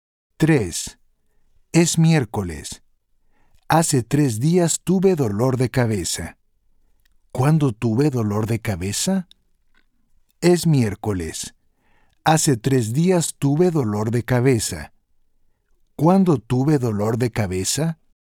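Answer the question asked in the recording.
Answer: el domingo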